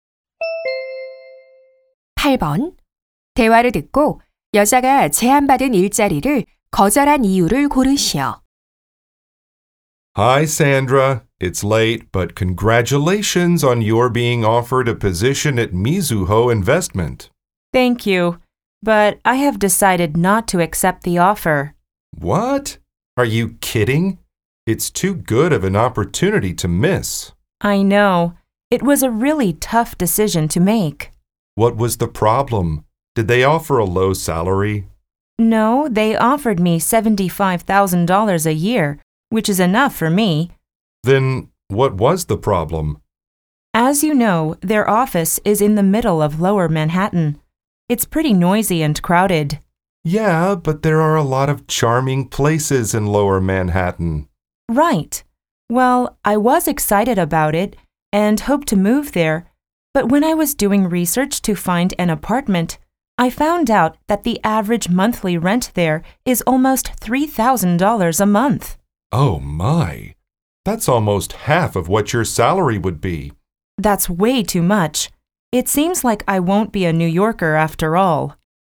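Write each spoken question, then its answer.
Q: 대화를 듣고 여자가 제안받은 일자리를 거절한 이유를 고르시오.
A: 회사 근처의 월세가 너무 비싸서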